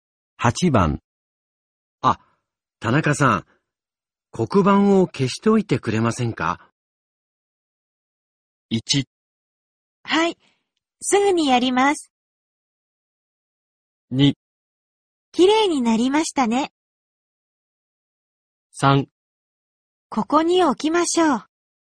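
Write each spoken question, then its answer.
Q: あ、田中さん、黒板を消しておいてくれませんか?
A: 1: はい、すぐにやります。

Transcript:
1
はい、すぐにやります。
2
きれいになりましたね。
3
ここに置きましょう。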